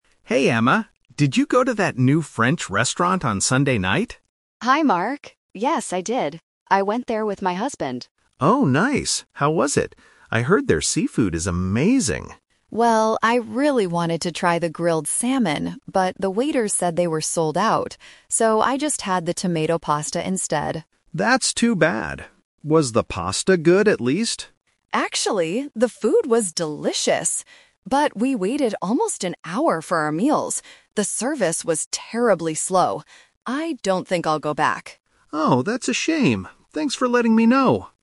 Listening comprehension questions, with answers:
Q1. What did Emma eat at the restaurant?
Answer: Tomato pasta.

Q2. Why didn't Emma have the seafood?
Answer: Because the restaurant didn't have any left.

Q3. What did Emma dislike about the restaurant?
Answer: The service was very slow.

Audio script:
Mark: Hey, Emma. Did you go to that new French restaurant on Sunday night?
Emma: Hi, Mark. Yes, I did. I went there with my husband.
Mark: Oh, nice! How was it? I heard their seafood is amazing.
Emma: Well, I really wanted to try the grilled salmon, but the waiter said they were sold out. So, I just had the tomato pasta instead.
Mark: That's too bad. Was the pasta good, at least?
Emma: Actually, the food was delicious! But we waited almost an hour for our meals. The service was terribly slow. I don't think I'll go back.
Mark: Oh, that's a shame. Thanks for letting me know!